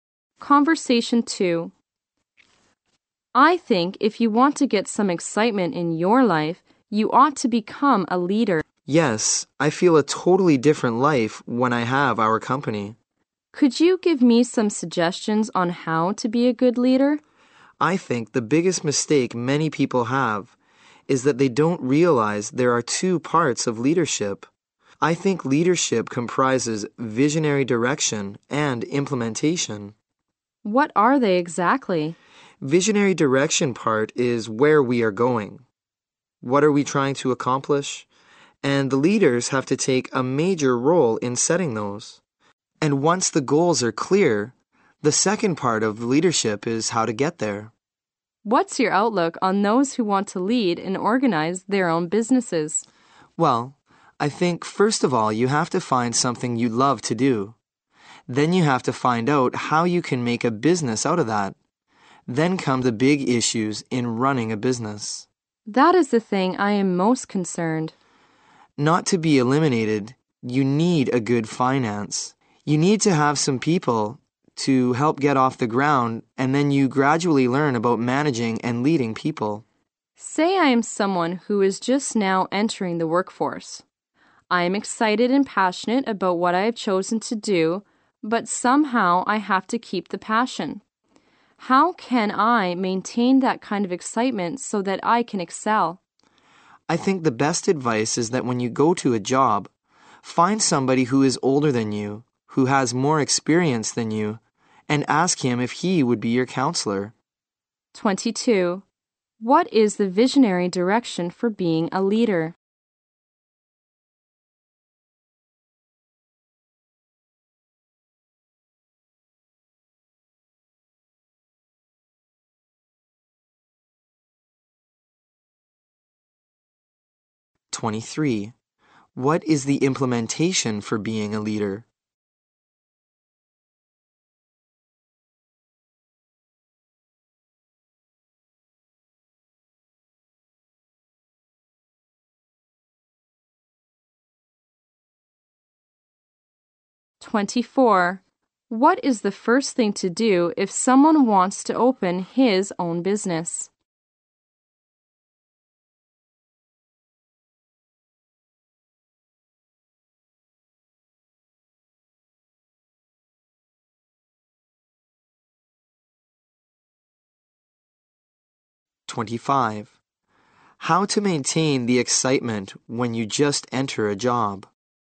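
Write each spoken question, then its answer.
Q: What is the visionary direction for being a leader?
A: Setting where we are going and what we're trying to accomplish

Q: What is the implementation for being a leader?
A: How to get there once the goals are clear

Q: What is the first thing to do if someone wants to open his own business?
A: Find something you love to do

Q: How to maintain the excitement when you just enter a job?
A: Find an older, more experienced person to be your counselor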